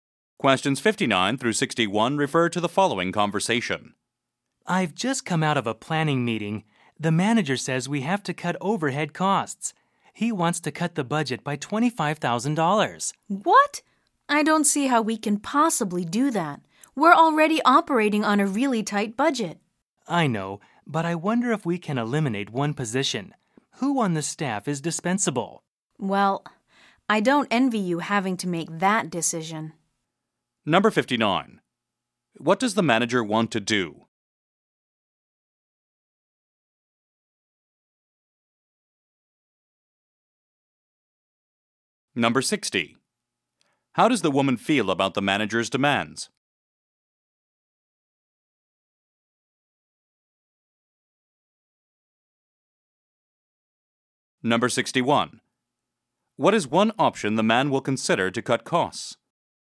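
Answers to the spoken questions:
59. Cut overhead costs by $25,000
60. She thinks it is impossible
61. Eliminating one position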